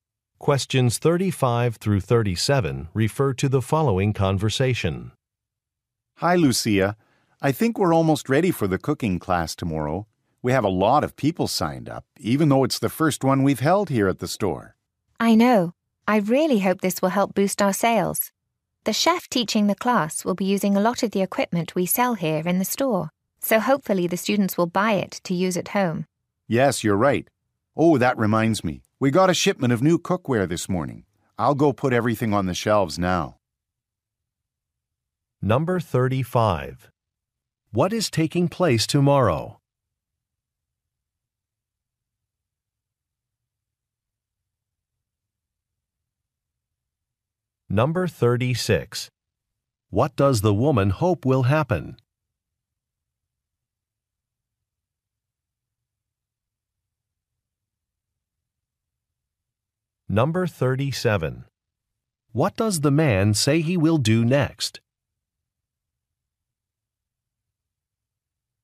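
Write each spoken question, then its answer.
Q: What is taking place tomorrow?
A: A cooking class

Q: What does the woman hope will happen?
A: Sales will increase

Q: What does the man say he will do next?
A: Put new cookware on the shelves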